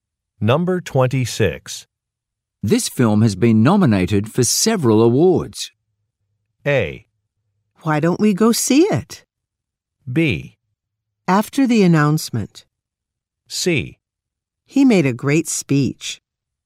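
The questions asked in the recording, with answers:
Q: This film has been nominated for several awards.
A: A: Why don't we go see it?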